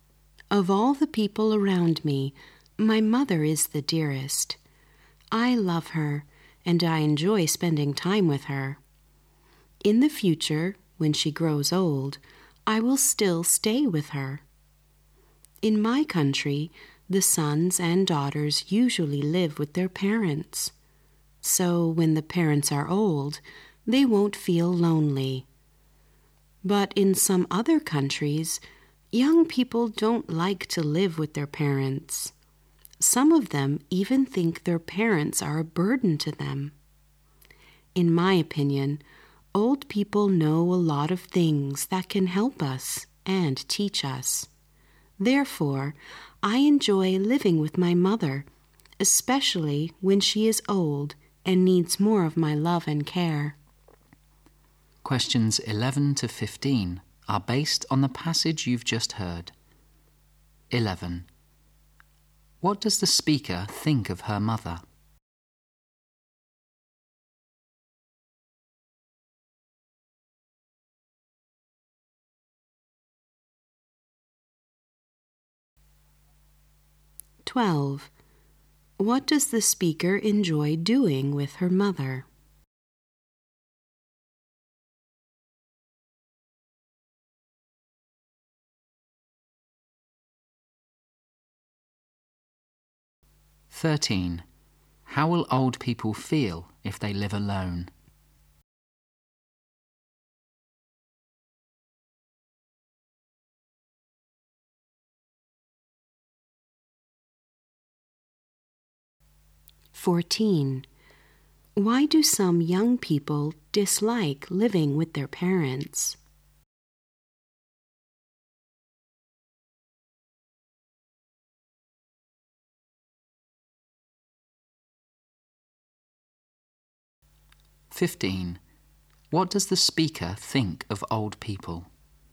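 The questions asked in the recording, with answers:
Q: What does the speaker think of her mother?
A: She is the dearest

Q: What does the speaker enjoy doing with her mother?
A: Spending time with her

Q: How will old people feel if they live alone?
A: Lonely

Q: Why do some young people dislike living with their parents?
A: They think parents are a burden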